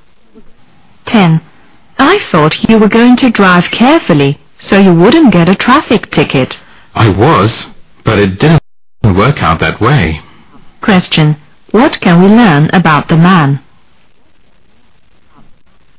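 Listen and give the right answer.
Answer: He got a traffic ticket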